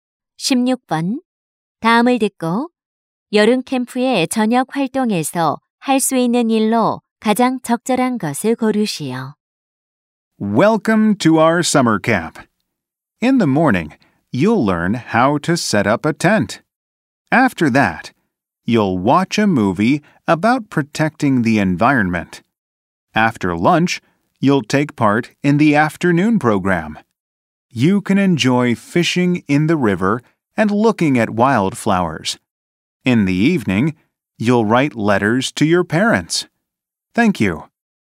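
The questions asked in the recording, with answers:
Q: 다음을 듣고 여름 캠프의 저녁 활동에서 할 수 있는 일로 가장 적절한 것을 고르시오.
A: 부모님께 편지 쓰기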